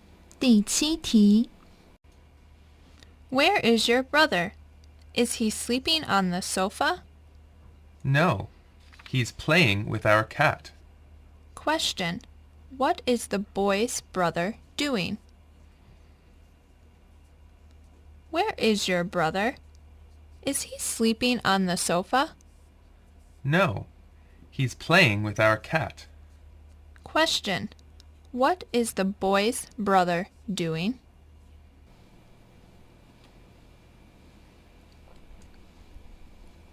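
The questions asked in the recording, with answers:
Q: Question,What is the boy's brother doing?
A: Playing with their cat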